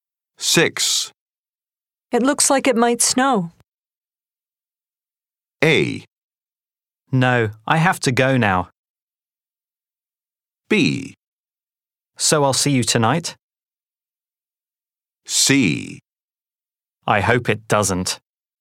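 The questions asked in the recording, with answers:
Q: It looks like it might snow.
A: C: I hope it doesn't.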